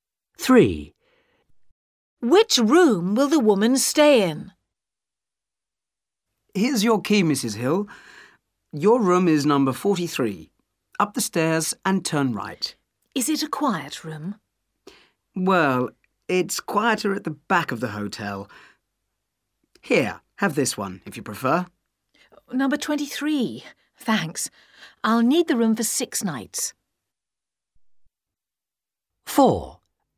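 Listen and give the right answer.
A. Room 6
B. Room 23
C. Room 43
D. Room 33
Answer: B. Room 23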